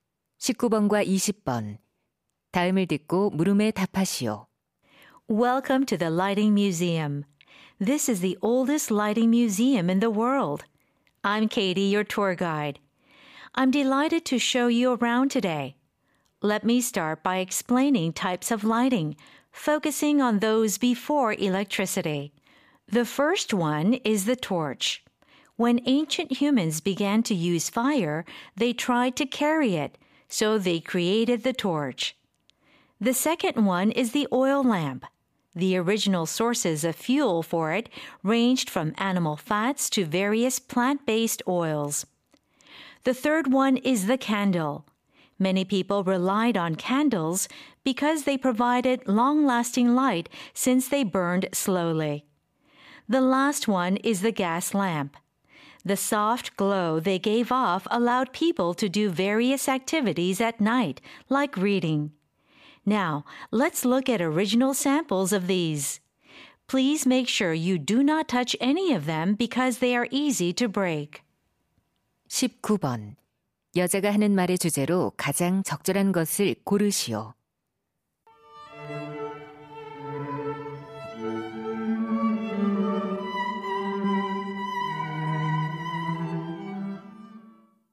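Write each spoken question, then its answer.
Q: 여자가 하는 말의 주제로 가장 적절한 것을 고르시오.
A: 전기 이전의 조명 종류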